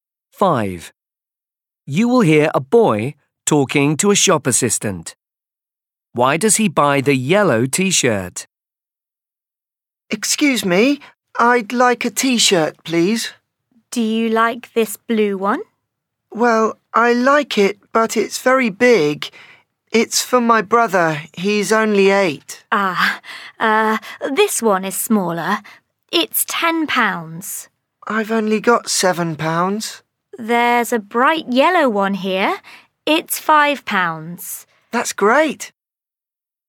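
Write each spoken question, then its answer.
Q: Why does he buy the yellow T-shirt?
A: it is cheap enough (£5; he only has £7)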